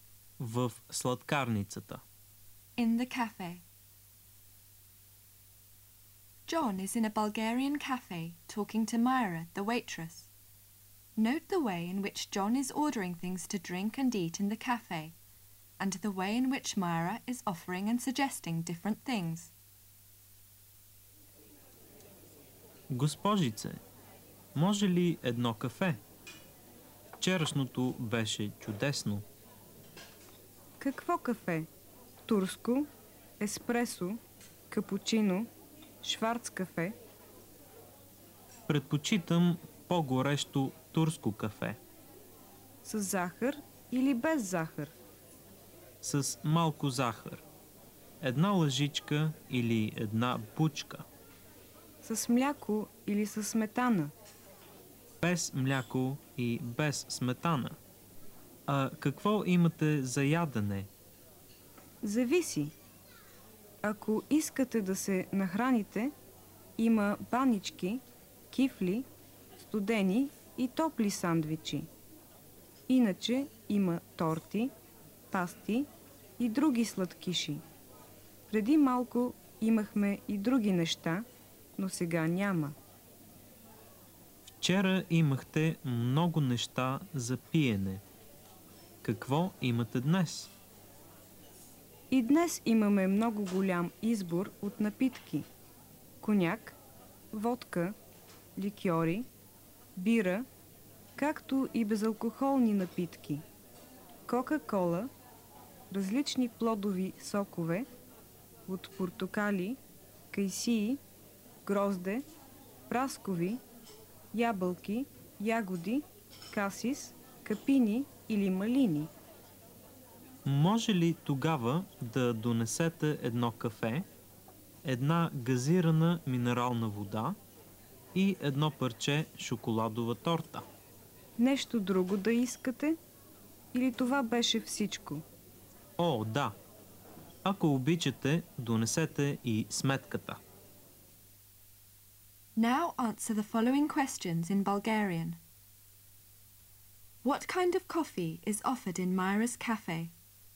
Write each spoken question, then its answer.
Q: What kind of coffee is offered in Myra's cafe?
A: Турско, еспресо, капучино, шварц кафе.